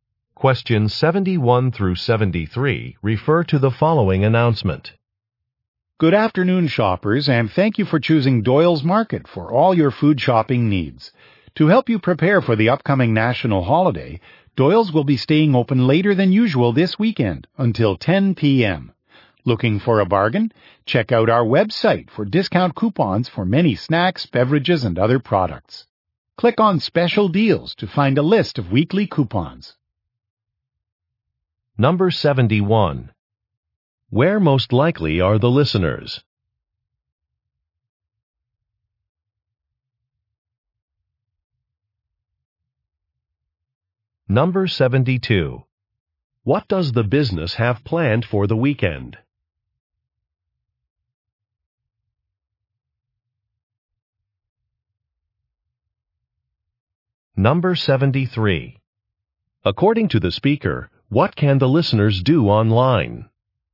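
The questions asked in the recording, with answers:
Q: Where most likely are the listeners?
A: At a grocery store (Doyle's Market)

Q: What does the business have planned for the weekend?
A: Staying open later, until 10 p.m.

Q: According to the speaker, what can the listeners do online?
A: Get discount coupons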